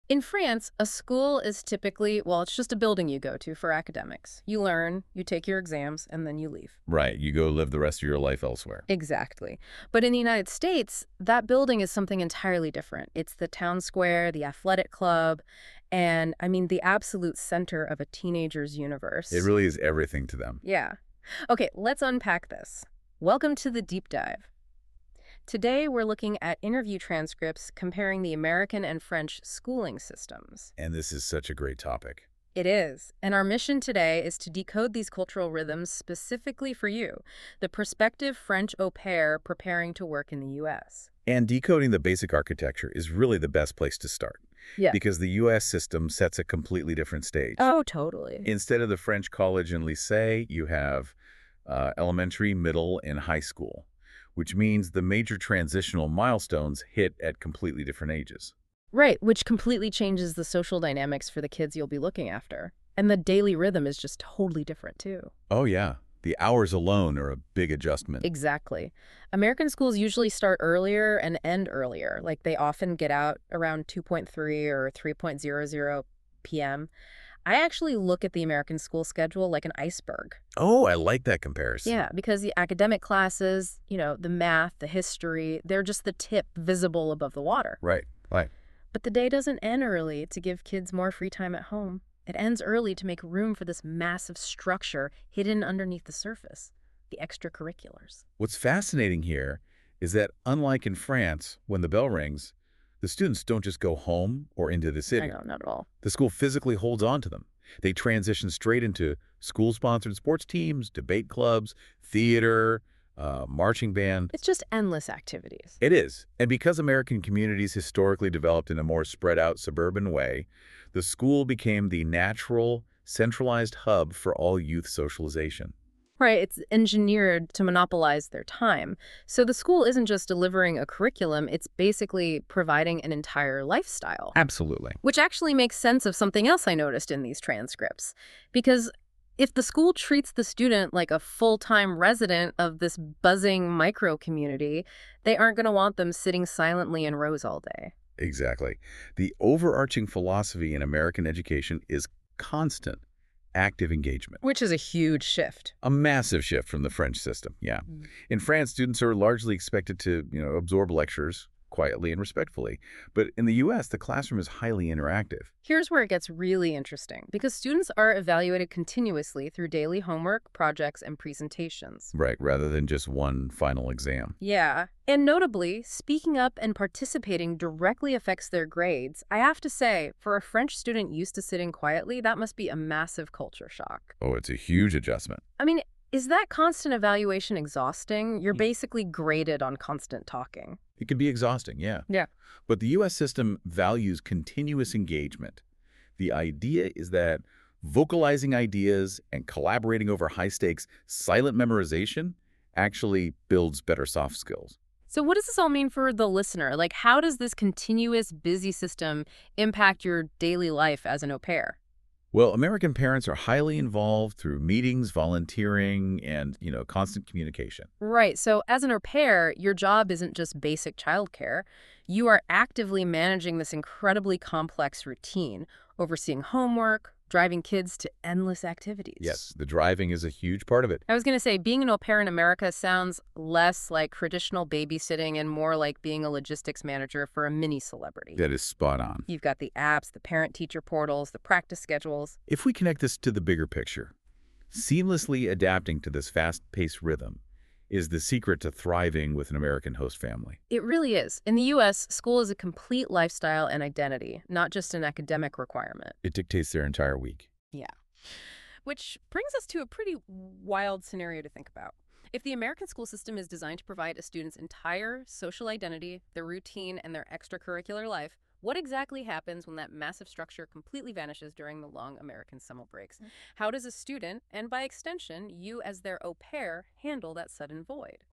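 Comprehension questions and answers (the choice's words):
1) What is one key characteristic of American schools?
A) Very informal structure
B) Strong emphasis on participation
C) No homework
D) No teacher authority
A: Strong emphasis on participation

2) How are students encouraged to behave in class?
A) Stay silent at all times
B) Only listen to the teacher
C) Participate and ask questions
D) Work independently only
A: Participate and ask questions

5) What might surprise a French au pair about American schools?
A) Lack of structure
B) Focus on discussion and participation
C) No schedules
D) No teachers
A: Focus on discussion and participation

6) What is often expected from children after school?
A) Nothing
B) Only rest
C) Homework or activities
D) Work jobs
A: Homework or activities

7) How can an au pair support children academically?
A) Doing the homework for them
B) Ignoring schoolwork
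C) Helping with homework and organization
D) Teaching full lessons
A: Helping with homework and organization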